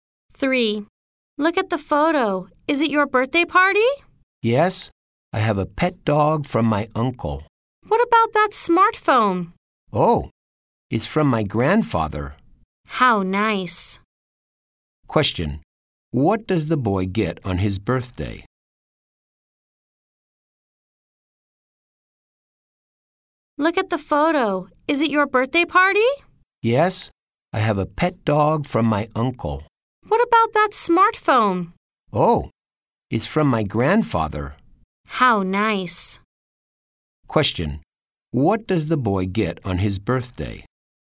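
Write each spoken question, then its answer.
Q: What does the boy get on his birthday?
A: A pet dog and a smartphone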